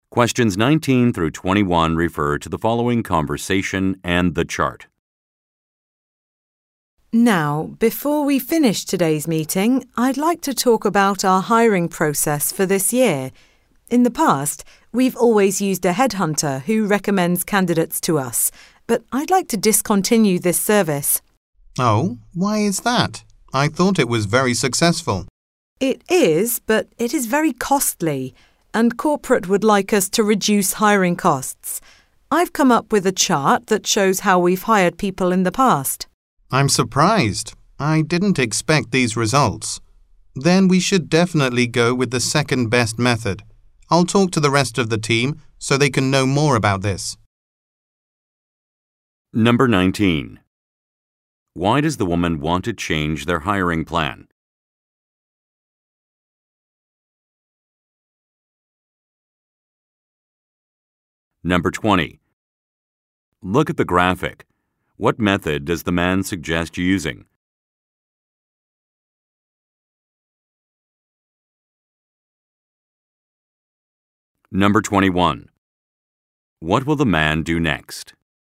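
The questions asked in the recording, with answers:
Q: Why does the woman want to change their hiring plan?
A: To reduce hiring costs, because the headhunter is very costly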